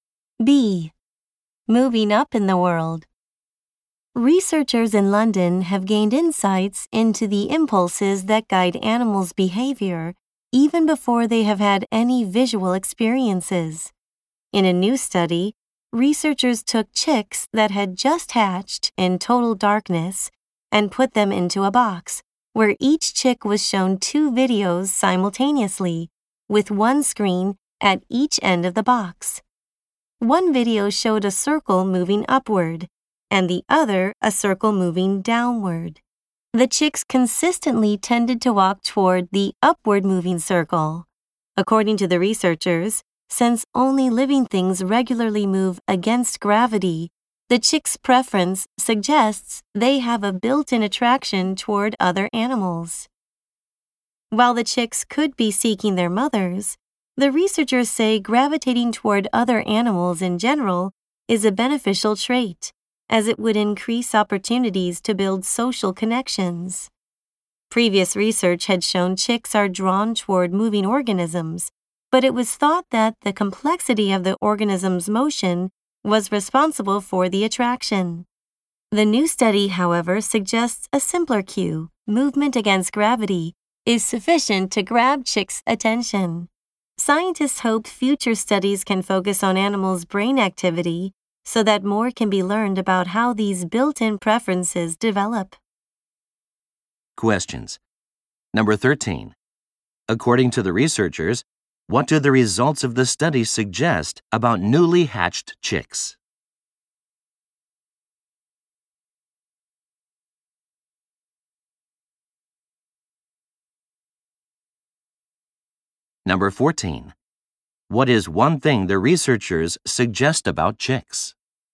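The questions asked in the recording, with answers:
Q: According to the researchers, what do the results of the study suggest about newly hatched chicks?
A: They have a built-in attraction toward other animals.

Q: What is one thing the researchers suggest about chicks?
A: Movement against gravity alone is enough to get their attention, and being drawn to other animals helps them build social connections.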